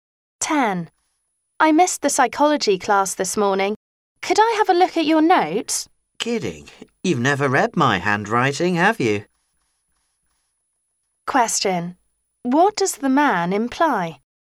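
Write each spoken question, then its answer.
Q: What does the man imply?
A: His handwriting is hard to read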